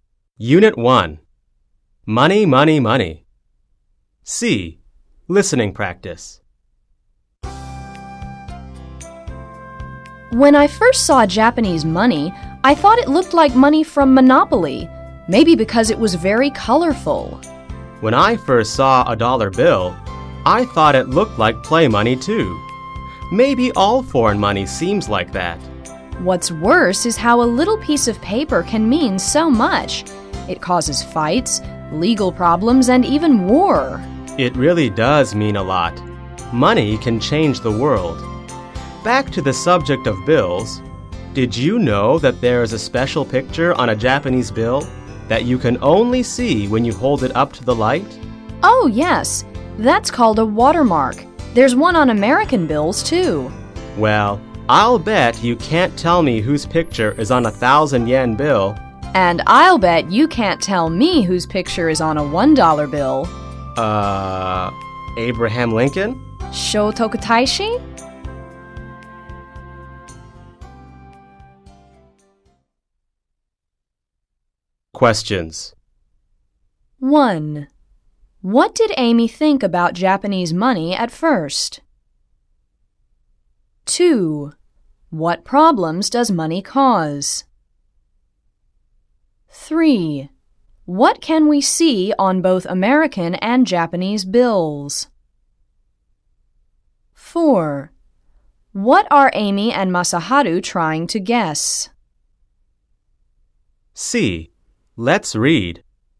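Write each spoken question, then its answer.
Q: What problems does money cause?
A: Fights, legal problems, and even war

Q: What can we see on both American and Japanese bills?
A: A watermark

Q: What are Amy and Masaharu trying to guess?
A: Whose picture is on the 1,000 yen bill and the $1 bill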